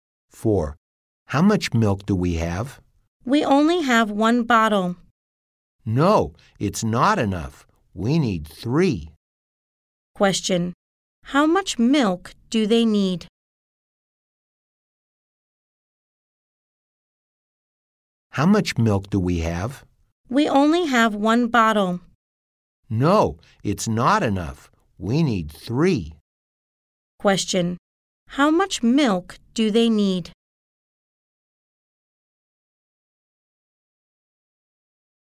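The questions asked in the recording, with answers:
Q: How much milk do they need?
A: 3 bottles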